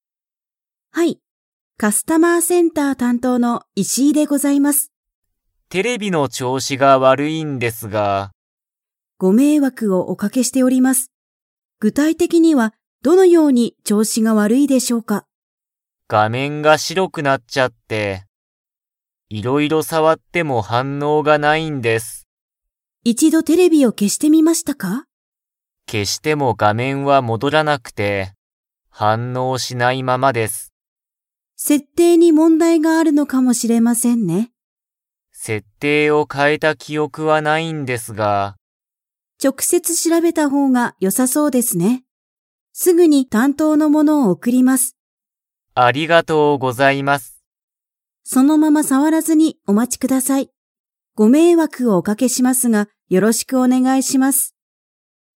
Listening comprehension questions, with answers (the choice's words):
Comprehension Quiz (Skip if you don't understand the conversation yet)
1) 原田はらださんのテレビは、画面がめんが なっちゃっている。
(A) 赤あかく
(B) 青あおく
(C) 黒くろく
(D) 白しろく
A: 白しろく

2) 石井いしいさんは、原田はらださんの家いえに 。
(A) 行いく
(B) 行いかない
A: 行いかない

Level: Level 4